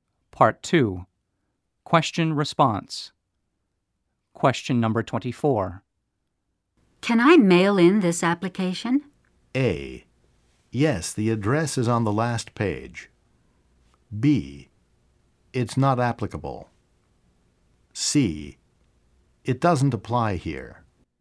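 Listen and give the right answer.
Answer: A: Yes, the address is on the last page.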